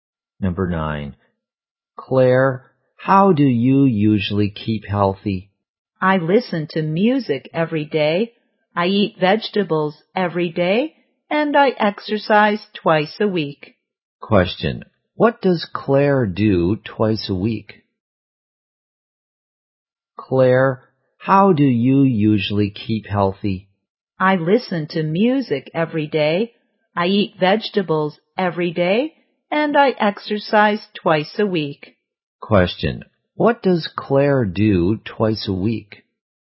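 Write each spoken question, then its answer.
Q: What does Claire do twice a week?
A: She exercises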